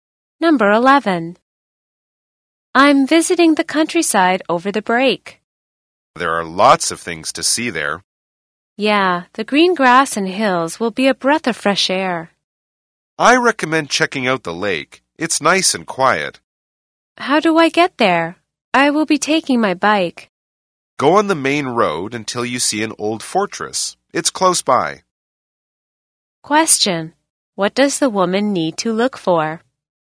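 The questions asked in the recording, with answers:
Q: What does the woman need to look for?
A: An old fortress.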